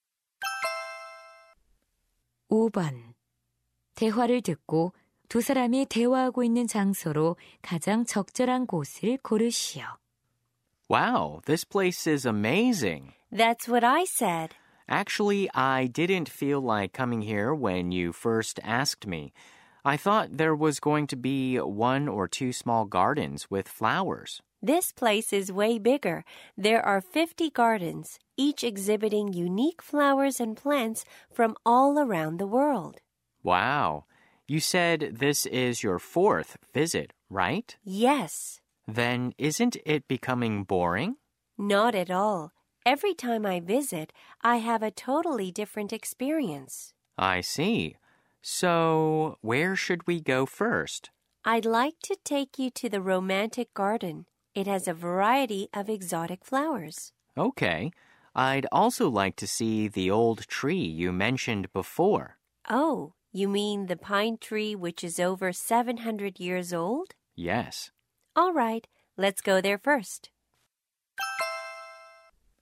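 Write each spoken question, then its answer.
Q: 대화를 듣고 두 사람이 대화하고 있는 장소로 가장 적절한 곳을 고르시오.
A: 식물원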